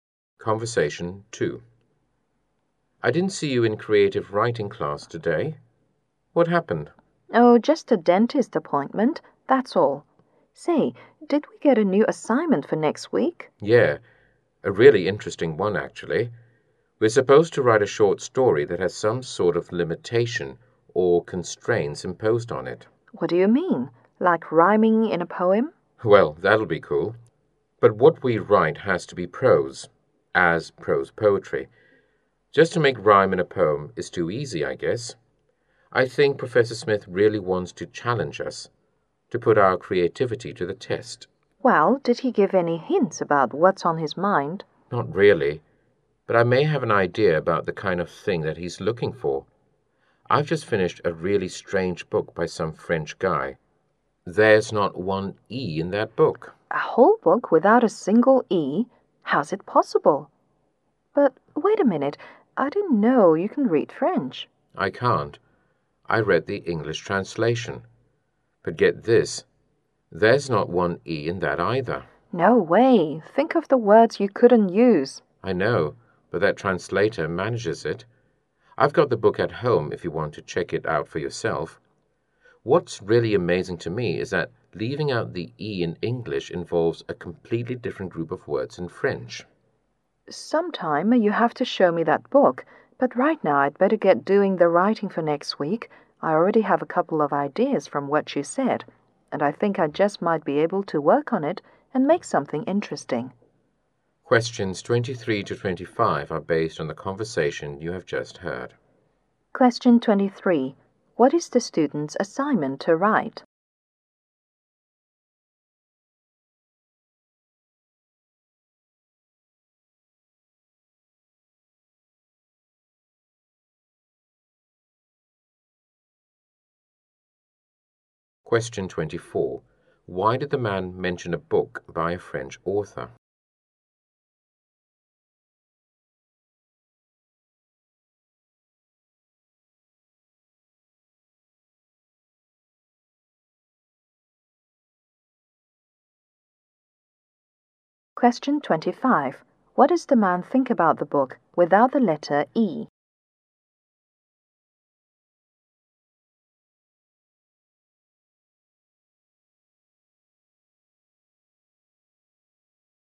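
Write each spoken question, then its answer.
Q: What is the student's assignment to write?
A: A prose short story with some limitation or constraint imposed on it

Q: Why did the man mention a book by a French author?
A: As an example of writing with a constraint (no letter E)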